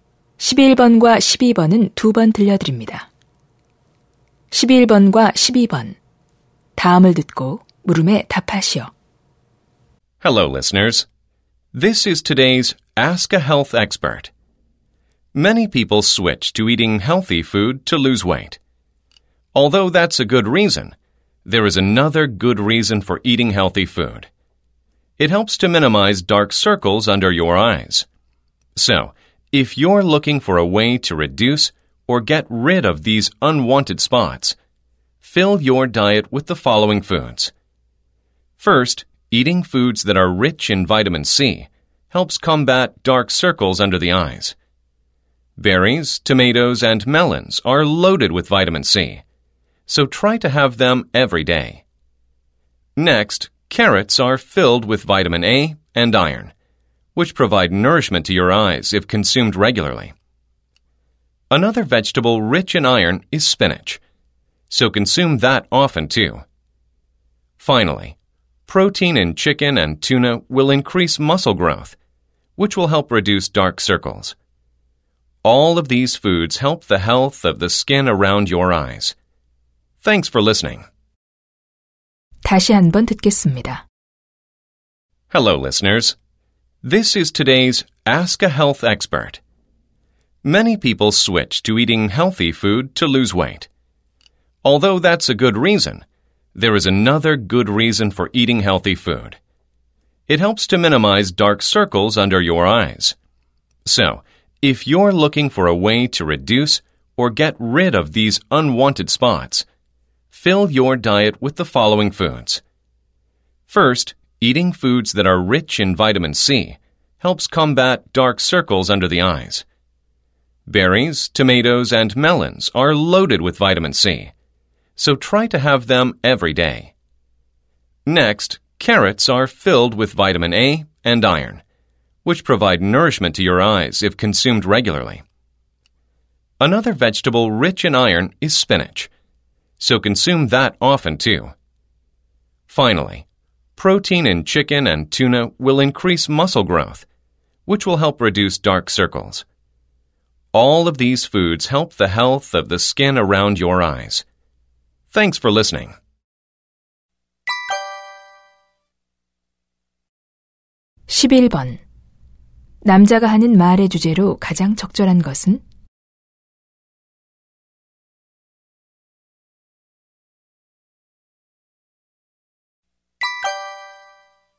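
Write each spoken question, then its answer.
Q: 남자가 하는 말의 주제로 가장 적절한 것은?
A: 눈 밑 다크서클을 줄이는 데 도움이 되는 음식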